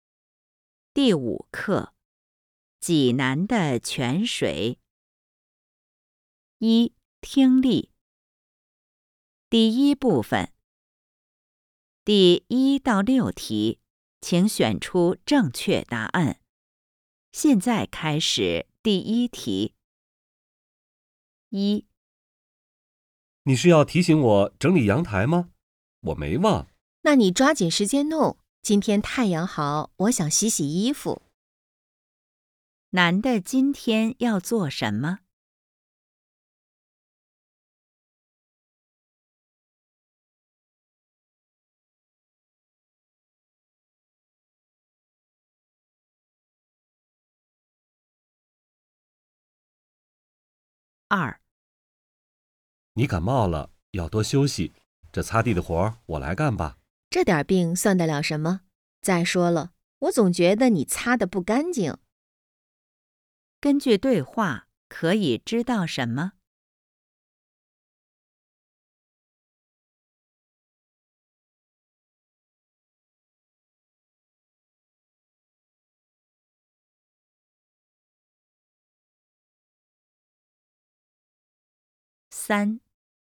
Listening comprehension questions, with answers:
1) 男的今天要做什么?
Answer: 收拾阳台

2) 根据对话,可以知道什么?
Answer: 男的擦地不干净

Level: HSK 5